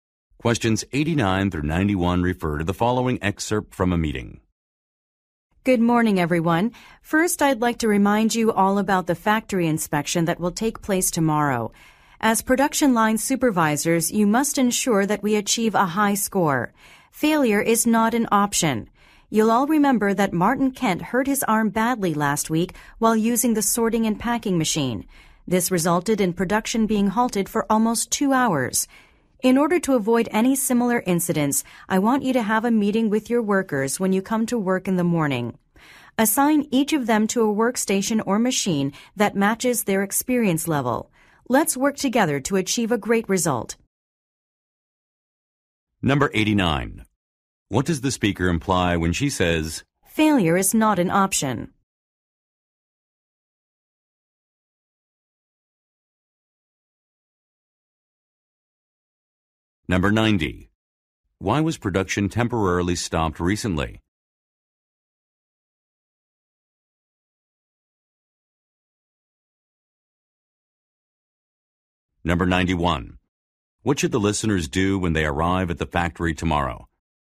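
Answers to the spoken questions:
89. The inspection must be passed
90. A worker was injured using a machine
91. Meet with their workers and assign workstations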